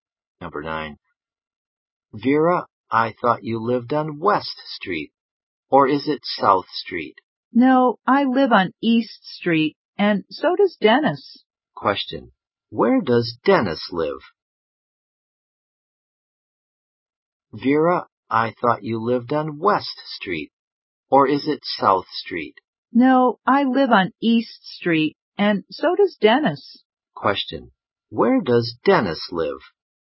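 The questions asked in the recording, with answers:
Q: Question. Where does Dennis live?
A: On East Street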